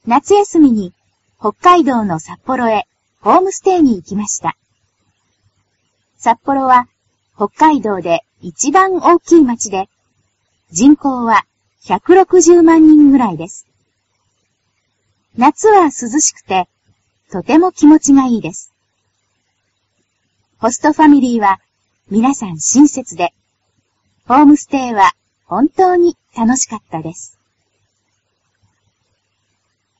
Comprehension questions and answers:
ひらがなで書いてください。。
札幌は北海道で.........................、人口は160万人ぐらいです。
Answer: いちばんおおきいまち